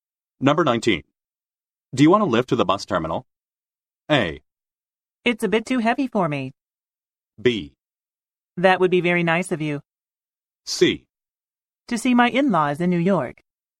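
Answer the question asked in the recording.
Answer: B: That would be very nice of you.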